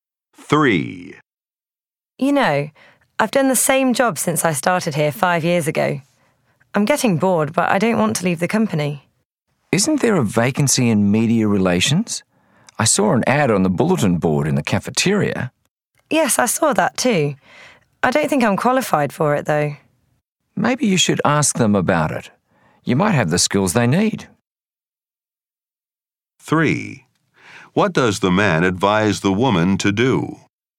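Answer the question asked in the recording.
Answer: Ask about the media relations vacancy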